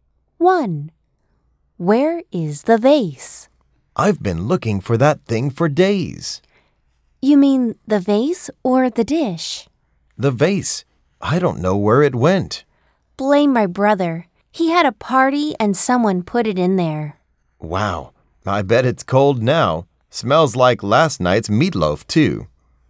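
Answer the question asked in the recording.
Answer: In the refrigerator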